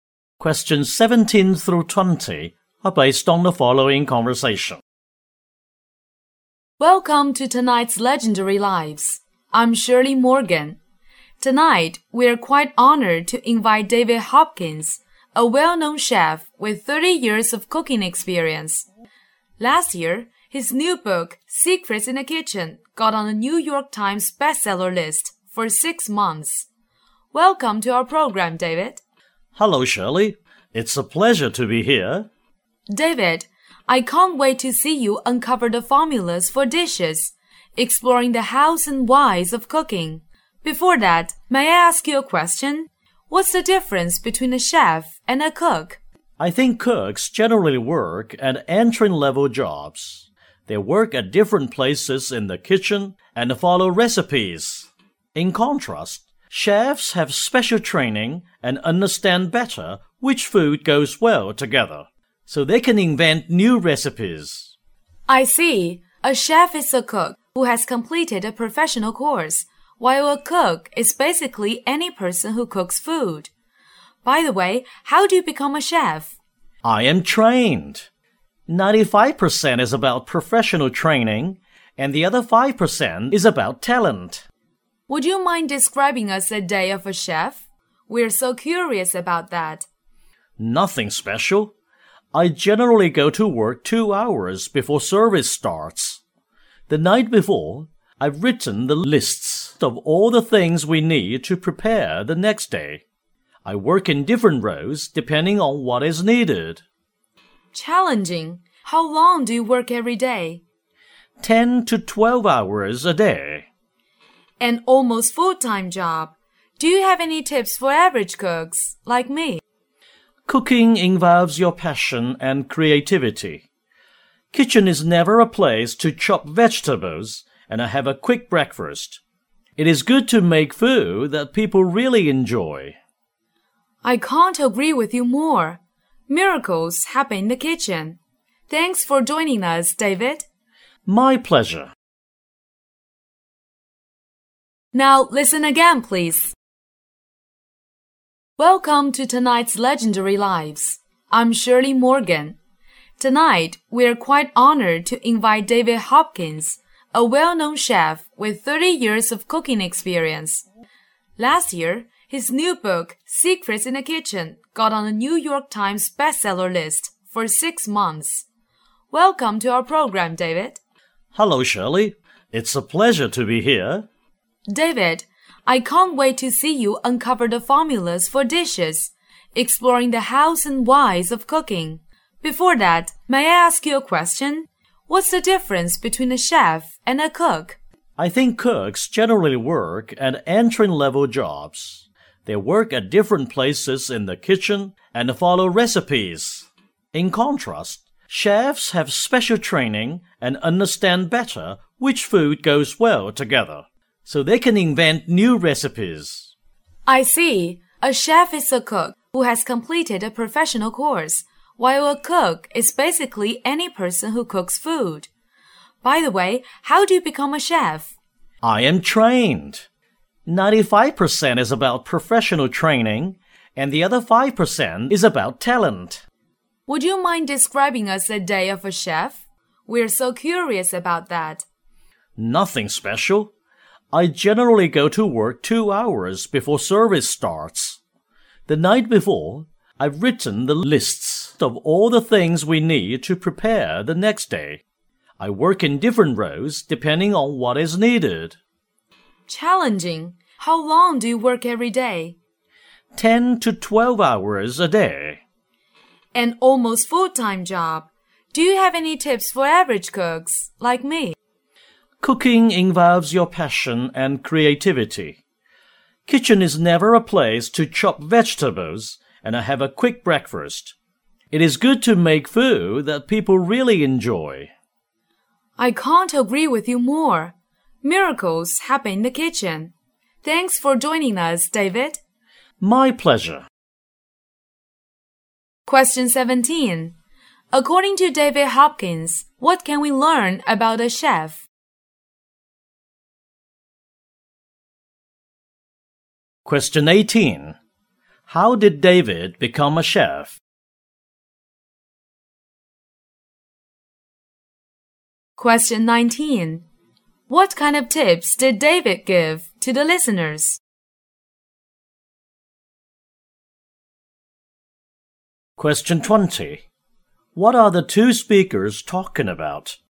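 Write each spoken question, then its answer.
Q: According to David Hopkins, what can we learn about a chef?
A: Chefs have special training and can invent new recipes

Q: How did David become a chef?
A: Mainly through professional training

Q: What kind of tips did David give to the listeners?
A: Cook with passion and creativity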